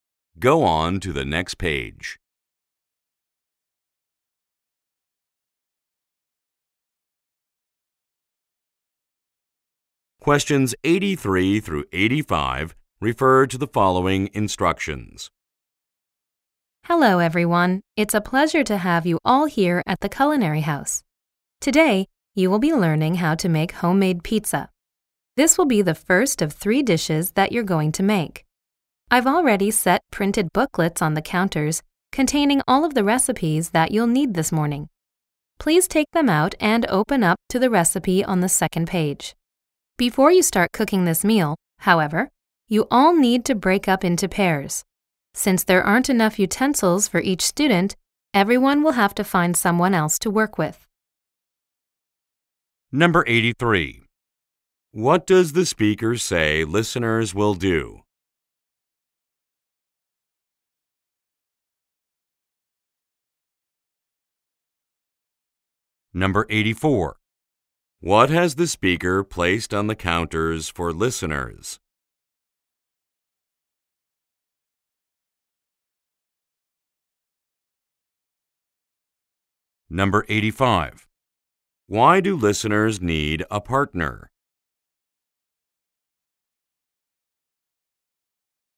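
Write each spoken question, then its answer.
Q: What does the speaker say listeners will do?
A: Learn to make homemade pizza

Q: What has the speaker placed on the counters for listeners?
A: Printed recipe booklets

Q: Why do listeners need a partner?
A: There aren't enough utensils for each student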